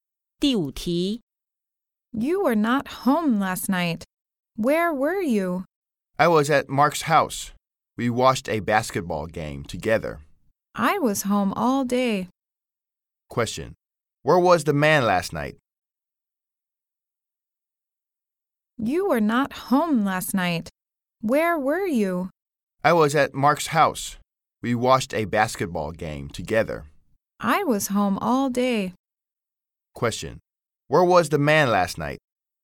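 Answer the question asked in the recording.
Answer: At Mark's house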